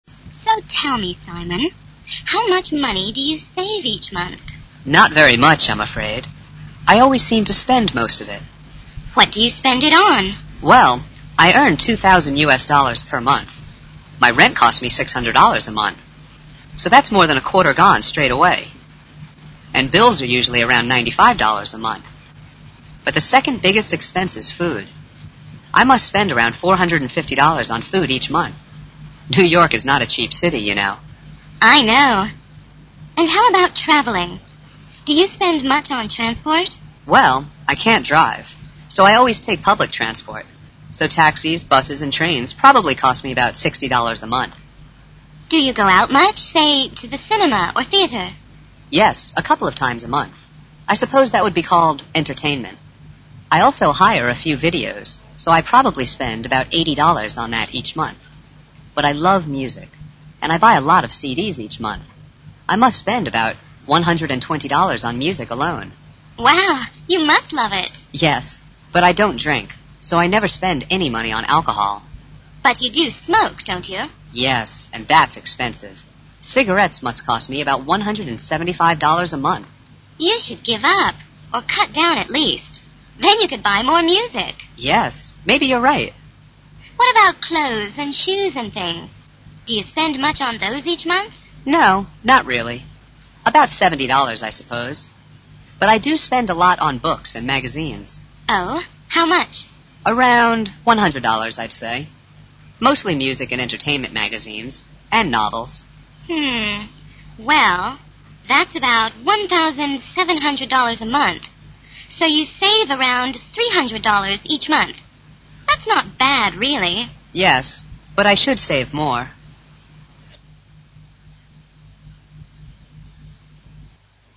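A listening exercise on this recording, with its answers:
You are going to hear a conversation between Simon and his friend. Listen and fill in the blanks below.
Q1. Simon earns ................................... (1)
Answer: $2,000 per month

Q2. He spends 600 USD on ................................... (2)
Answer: rent

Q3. His 2nd biggest expenses is on ................................... (3)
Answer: food

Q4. Expenses on transportation = ................................... (4)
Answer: 60 USD

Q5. Entertainment: - hiring ................................... (5), etc. = 80 USD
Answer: videos

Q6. - buying ................................... (6) = 120 USD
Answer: CDs

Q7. Alcohol = ................................... (7)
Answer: 0 USD (nothing)

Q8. ................................... (8) = 175 USD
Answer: Cigarettes

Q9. Spending on clothes, shoes, books, magazines, etc = ................................... 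(9)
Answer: 170 USD

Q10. Simon says he should save ................................... (10)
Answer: more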